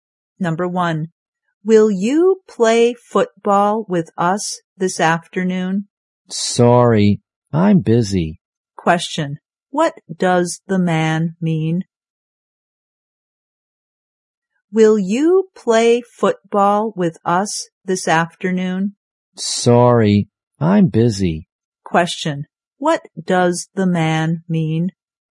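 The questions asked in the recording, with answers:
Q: what does the man mean?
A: He is busy and can't play football.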